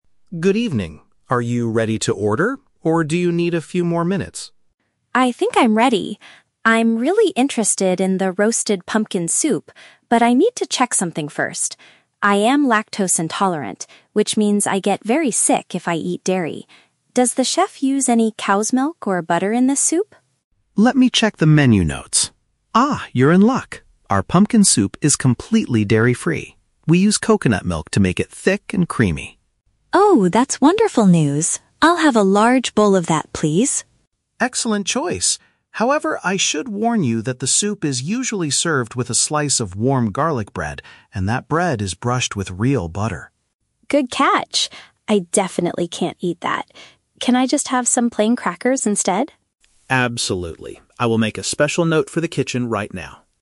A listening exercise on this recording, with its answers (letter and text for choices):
Listen to a conversation between a diner and a waiter. For each question, choose the correct answer (A, B, or C).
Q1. Why does the diner ask about the ingredients in the soup?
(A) She is trying to lose weight by avoiding heavy meals.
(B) She has a physical condition that prevents her from digesting dairy.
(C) She dislikes the taste of traditional cow's milk.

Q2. How does the restaurant make the pumpkin soup creamy?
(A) By adding a large amount of melted butter.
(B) By mixing in a special type of cheese.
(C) By using a liquid extracted from a tropical fruit.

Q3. What potential problem does the waiter point out about the meal?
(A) The kitchen has completely run out of the pumpkin soup.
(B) The side dish normally served with the soup contains a milk product.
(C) The plain crackers are not available at the restaurant tonight.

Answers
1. (B) She has a physical condition that prevents her from digesting dairy.
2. (C) By using a liquid extracted from a tropical fruit.
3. (B) The side dish normally served with the soup contains a milk product.

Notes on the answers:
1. The diner explains, "I am lactose intolerant, which means I get very sick if I eat dairy." This describes a physical condition preventing the digestion of dairy. Option (A) is a trap; she is asking for health reasons, not weight loss. Option (C) is a trap; it is not about the "taste", it is about getting "very sick."
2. The waiter states that they use "coconut milk" to make it creamy. A coconut is a tropical fruit, making its milk a liquid extracted from it. Options (A) and (B) are traps that mention common dairy products used in soups, which is exactly what the customer is trying to avoid.
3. The waiter warns her that the soup is served with "garlic bread" (a side dish) that is brushed with "real butter" (a milk product). Option (A) is not mentioned. Option (C) is a trap; the diner asks for crackers and the waiter says "Absolutely," meaning they are available.

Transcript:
Waiter: Good evening, are you ready to order, or do you need a few more minutes?
Diner: I think I'm ready. I'm really interested in the roasted pumpkin soup, but I need to check something first. I am lactose intolerant, which means I get very sick if I eat dairy. Does the chef use any cow's milk or butter in this soup?
Waiter: Let me check the menu notes. Ah, you're in luck! Our pumpkin soup is completely dairy-free. We use coconut milk to make it thick and creamy.
Diner: Oh, that's wonderful news. I'll have a large bowl of that, please.
Waiter: Excellent choice. However, I should warn you that the soup is usually served with a slice of warm garlic bread, and that bread is brushed with real butter.
Diner: Good catch! I definitely can't eat that. Can I just have some plain crackers instead?